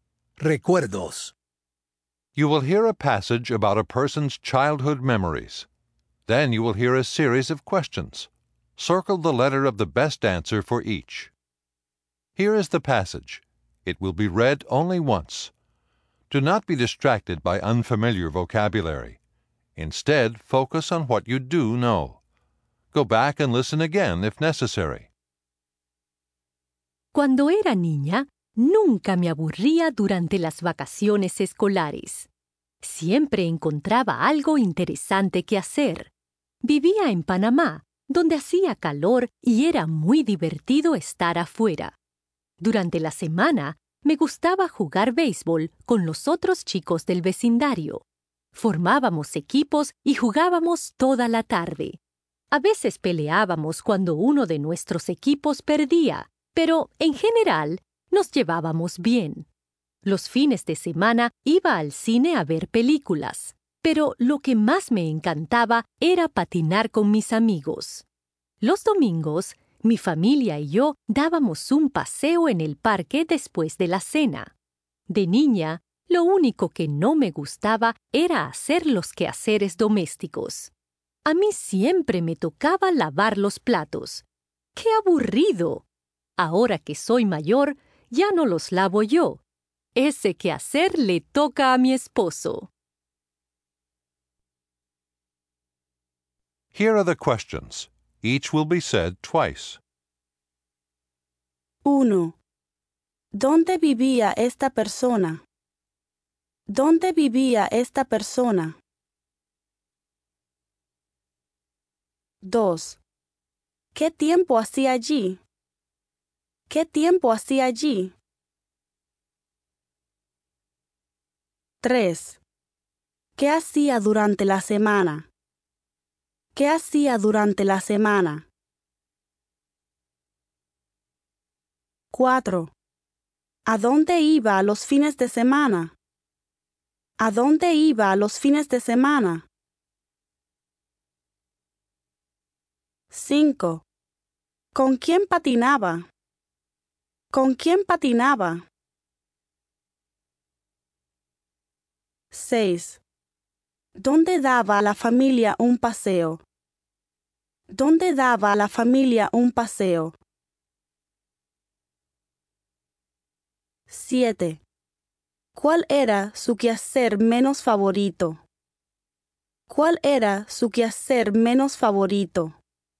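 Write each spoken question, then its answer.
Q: ¿Dónde vivía esta persona?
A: En Panamá

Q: ¿Qué tiempo hacía allí?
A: Hacía calor

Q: ¿Qué hacía durante la semana?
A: Jugaba béisbol con los otros chicos del vecindario

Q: ¿A dónde iba a los fines de semana?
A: Al cine

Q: ¿Con quién patinaba?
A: Con sus amigos

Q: ¿Dónde daba a la familia un paseo?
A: En el parque

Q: ¿Cuál era su quehacer menos favorito?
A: Lavar los platos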